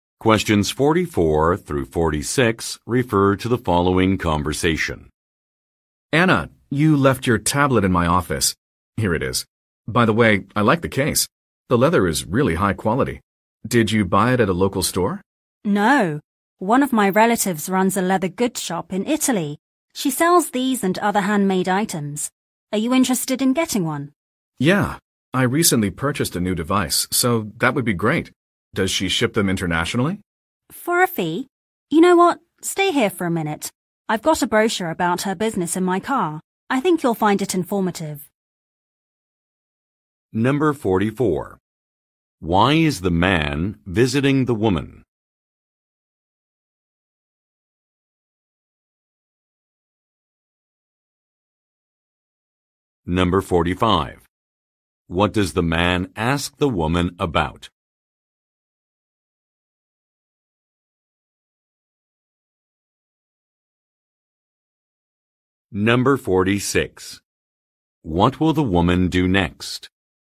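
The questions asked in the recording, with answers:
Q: Why is the man visiting the woman?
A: To return her tablet, which she left in his office

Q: What will the woman do next?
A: Get a brochure from her car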